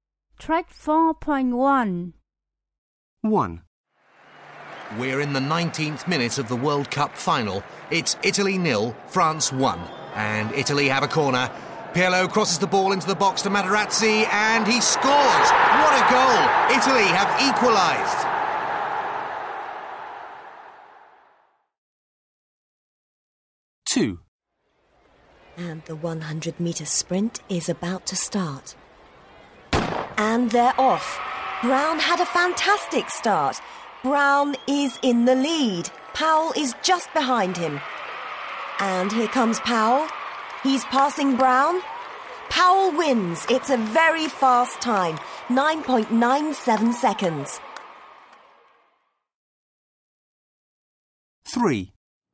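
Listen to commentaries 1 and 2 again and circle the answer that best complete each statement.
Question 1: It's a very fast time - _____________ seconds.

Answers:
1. 9.97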